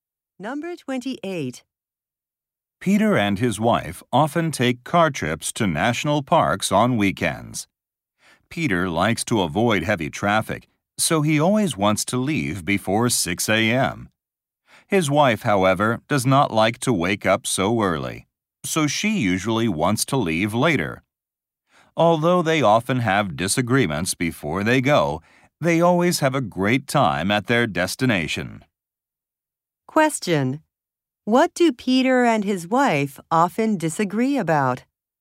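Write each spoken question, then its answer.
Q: What do Peter and his wife often disagree about?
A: What time to leave on trips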